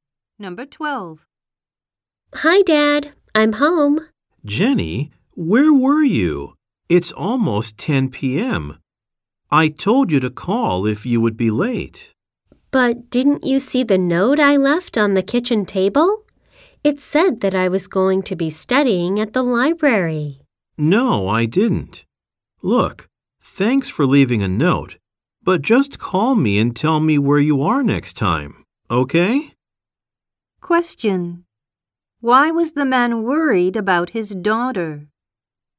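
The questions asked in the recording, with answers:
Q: Why was the man worried about his daughter?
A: She came home late without calling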